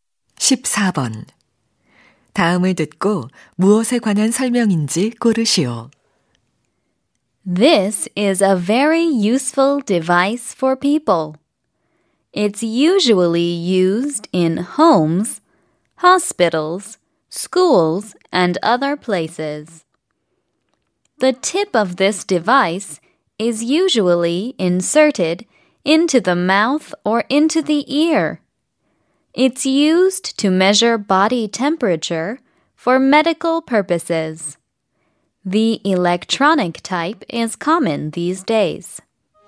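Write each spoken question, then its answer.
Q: 다음을 듣고 무엇에 관한 설명인지 고르시오.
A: 체온계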